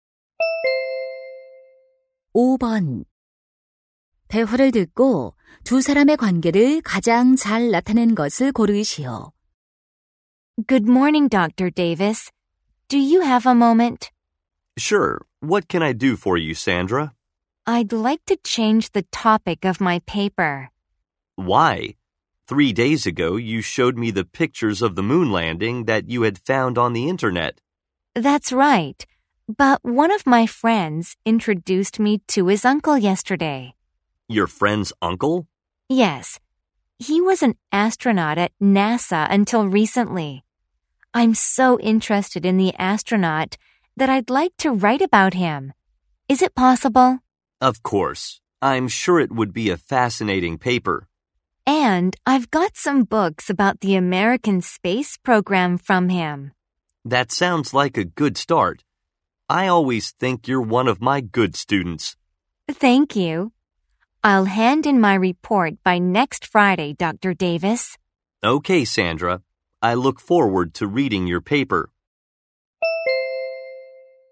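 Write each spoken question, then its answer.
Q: 대화를 듣고 두 사람의 관계를 가장 잘 나타낸 것을 고르시오.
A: 교수와 학생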